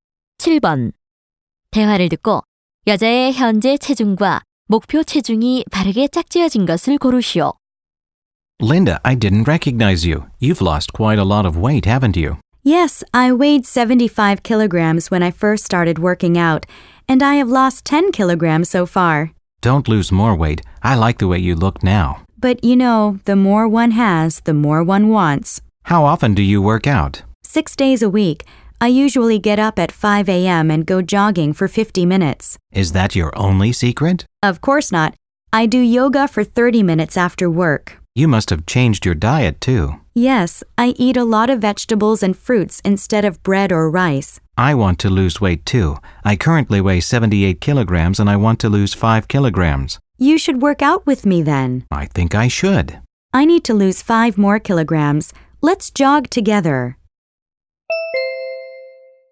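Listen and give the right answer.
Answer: 현재 65kg, 목표 60kg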